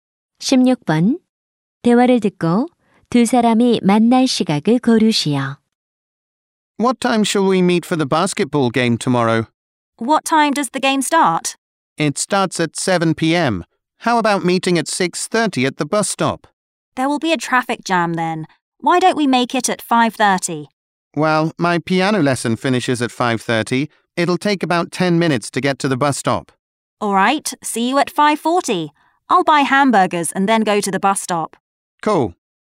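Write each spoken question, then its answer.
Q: 대화를 듣고 두 사람이 만날 시각을 고르시오.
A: 5시 40분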